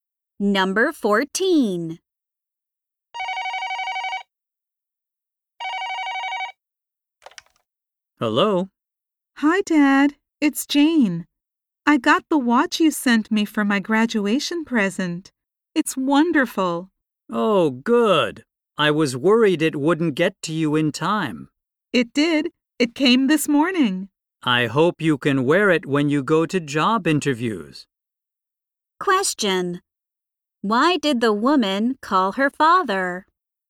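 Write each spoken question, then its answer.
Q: Why did the woman call her father?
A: To say she got the watch he sent for her graduation.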